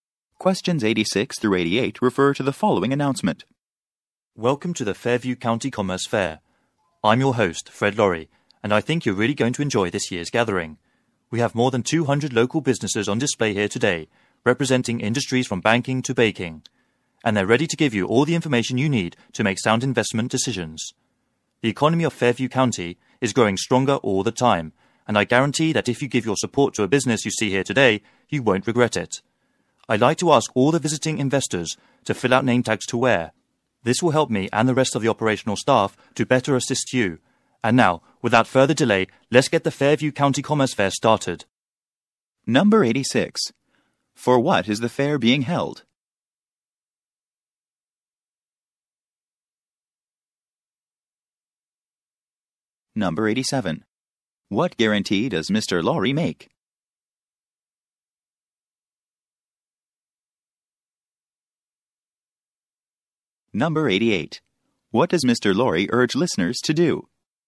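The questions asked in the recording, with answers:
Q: For what is the fair being held?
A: To showcase local businesses to investors

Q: What guarantee does Mr. Laurie make?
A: Supporting a business at the fair won't be regretted

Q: What does Mr. Laurie urge listeners to do?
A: Visiting investors should fill out name tags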